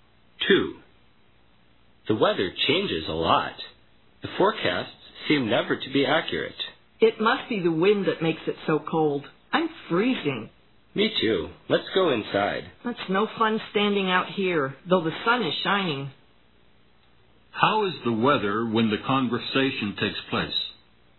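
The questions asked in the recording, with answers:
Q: How is the weather when the conversation takes place?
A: Sunny but windy and very cold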